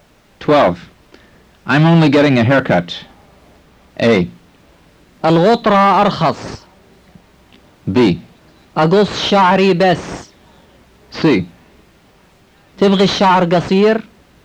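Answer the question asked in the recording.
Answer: B: أقص شعري بس.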